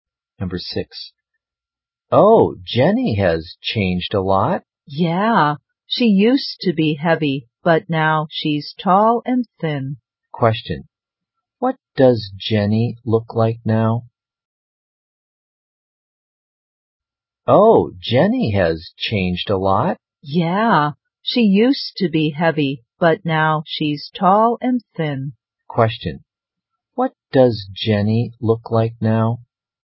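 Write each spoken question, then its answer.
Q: What does Jenny look like now?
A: Tall and thin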